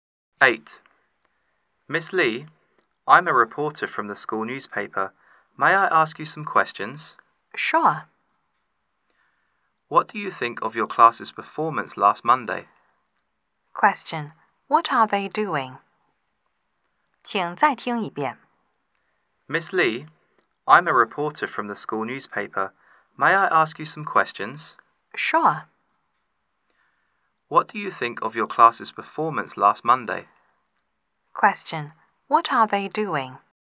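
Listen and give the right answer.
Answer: Having an interview for the school newspaper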